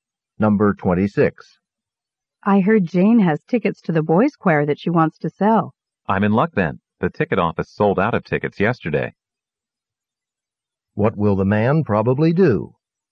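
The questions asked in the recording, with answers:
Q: What will the man probably do?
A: Buy tickets from Jane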